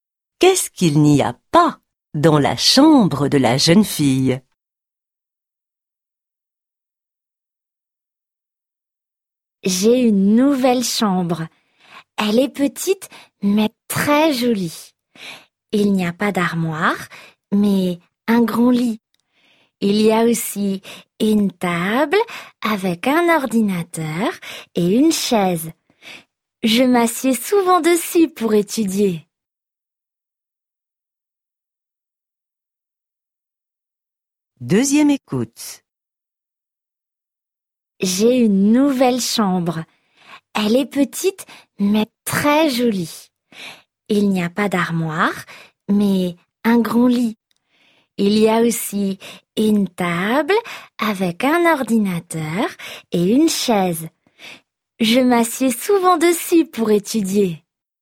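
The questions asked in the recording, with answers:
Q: Qu'est-ce qu'il n'y a pas dans la chambre de la jeune fille?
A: Une armoire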